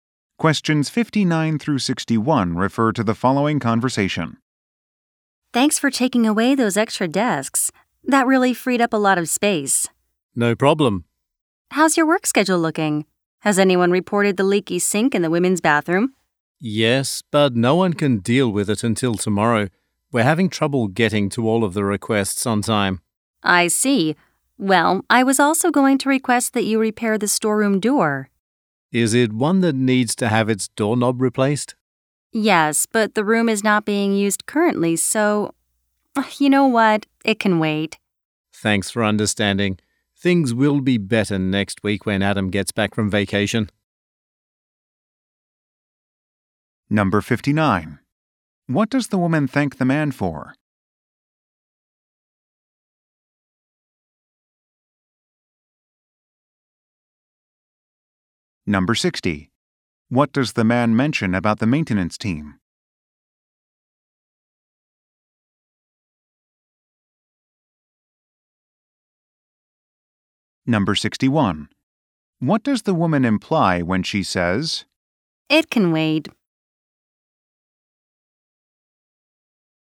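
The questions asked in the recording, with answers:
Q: What does the woman thank the man for?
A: Taking away the extra desks

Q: What does the man mention about the maintenance team?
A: They are having trouble handling all requests on time

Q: What does the woman imply when she says,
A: The door repair is not urgent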